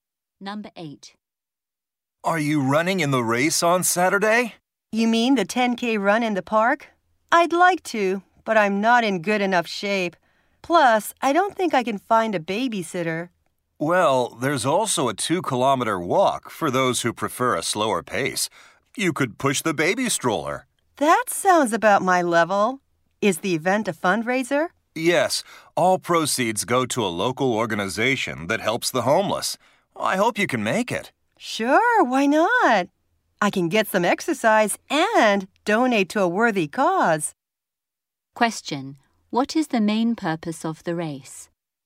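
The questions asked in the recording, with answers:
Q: What is the main purpose of the race?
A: To raise money for a local organization that helps homeless people.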